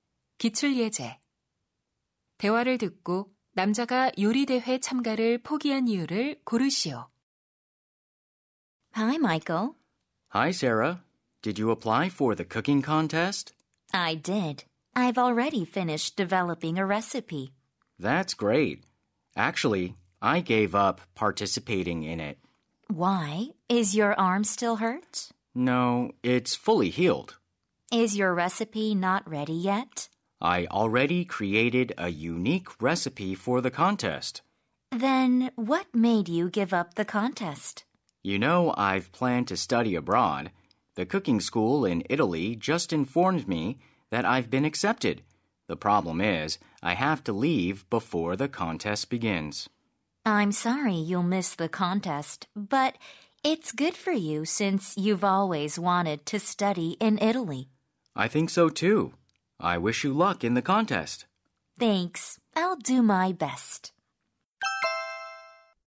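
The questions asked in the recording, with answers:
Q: 대화를 듣고 남자가 요리대회 참가를 포기한 이유를 고르시오.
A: 이탈리아 요리학교 유학 때문에 대회 전에 떠나야 해서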